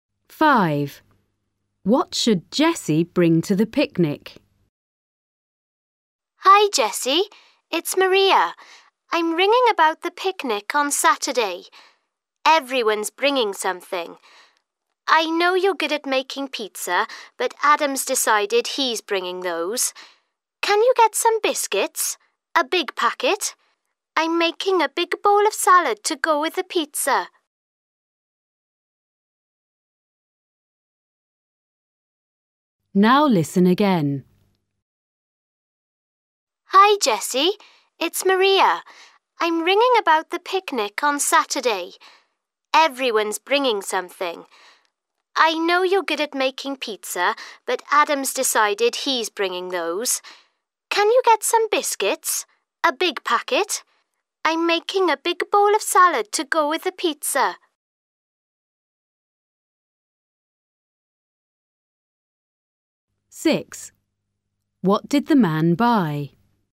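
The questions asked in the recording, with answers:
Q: What should Jessie bring to the picnic?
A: biscuits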